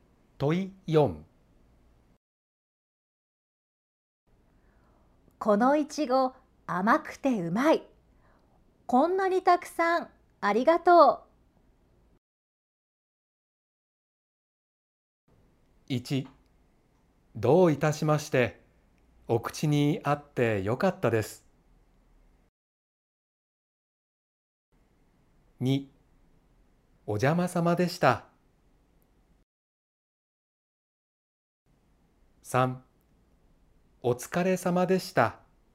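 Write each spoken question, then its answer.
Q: このいちご甘くてうまい。こんなにたくさんありがとう。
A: 1: どういたしまして。お口にあってよかったです。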